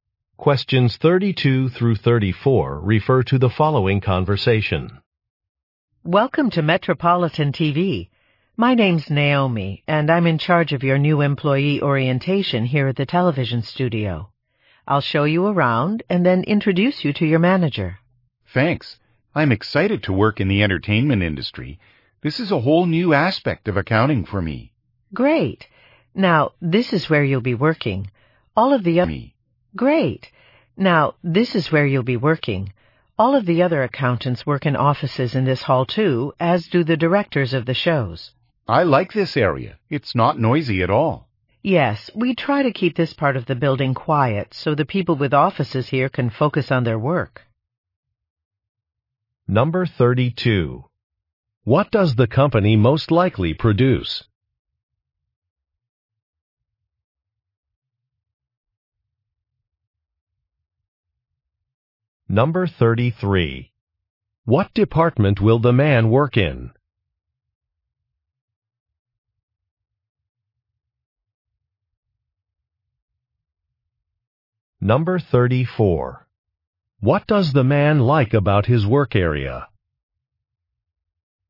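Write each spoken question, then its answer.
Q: What does the company most likely produce?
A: Television shows

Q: What department will the man work in?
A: Accounting

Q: What does the man like about his work area?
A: It is quiet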